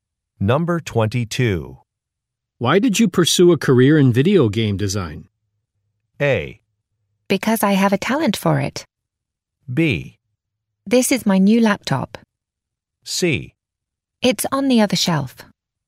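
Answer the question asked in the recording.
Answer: A: Because I have a talent for it.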